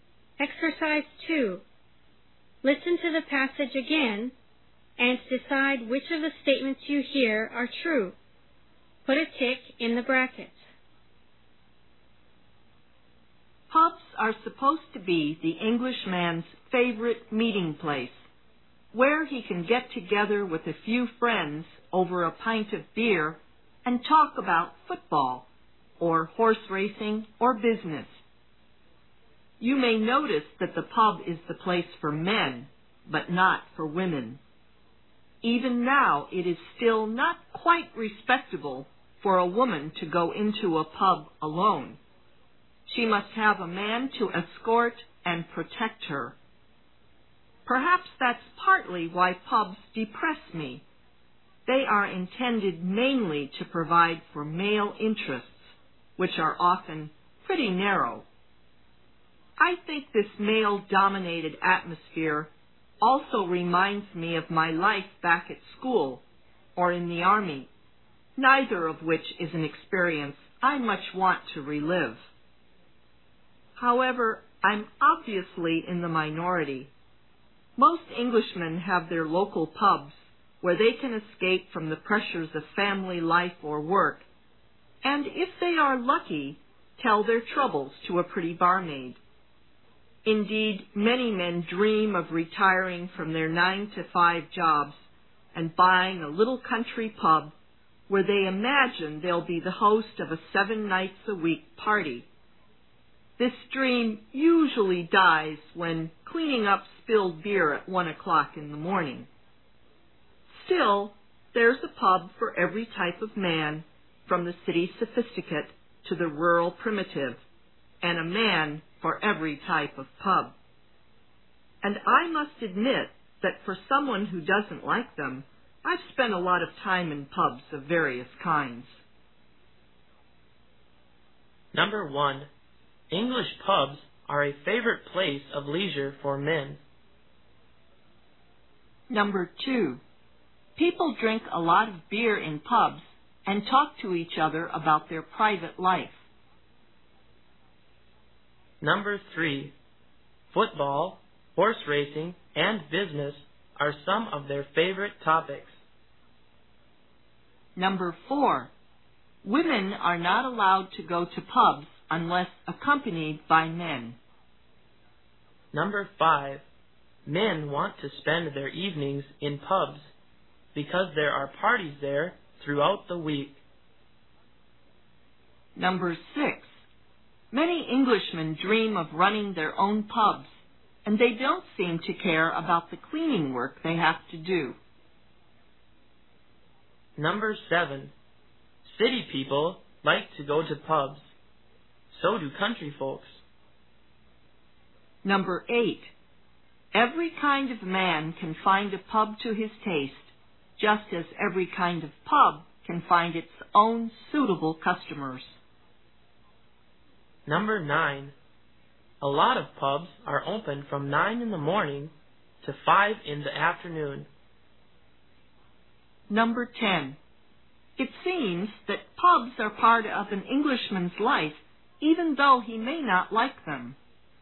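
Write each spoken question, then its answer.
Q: English pubs are a favorite place of leisure for men.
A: True

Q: football, horse racing, and business are some of their favorite topics.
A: True

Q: men want to spend their evenings in pubs because there are parties there throughout the week.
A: False

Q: many Englishmen dream of running their own pubs, and they don't seem to care about the cleaning work they have to do.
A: False

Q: city people like to go to pubs.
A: True

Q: every kind of man can find a pub to his taste, just as every kind of pub can find its own suitable customers.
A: True

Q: a lot of pubs are open from 9 in the morning to 5 in the afternoon.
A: False

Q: it seems that pubs are part of an Englishman's life, even though he may not like them.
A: True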